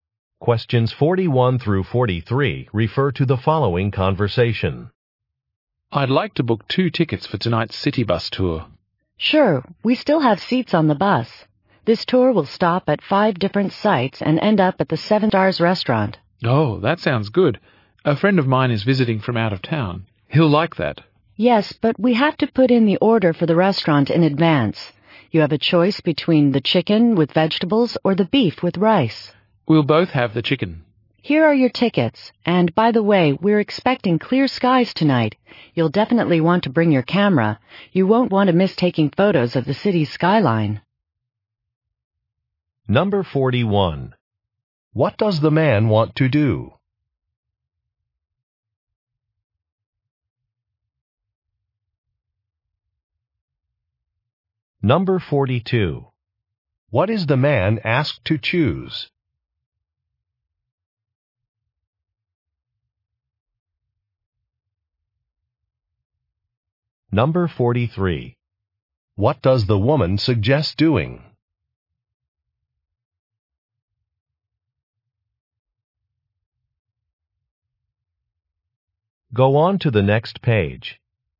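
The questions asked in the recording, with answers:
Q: What does the man want to do?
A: Book tickets for a city bus tour

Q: What is the man asked to choose?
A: A meal

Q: What does the woman suggest doing?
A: Bringing a camera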